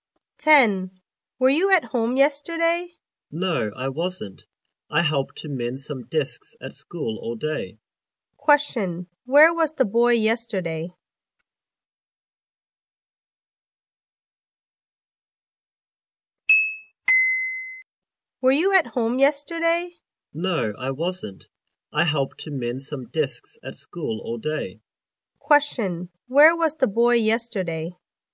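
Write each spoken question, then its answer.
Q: Where was the boy yesterday?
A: At school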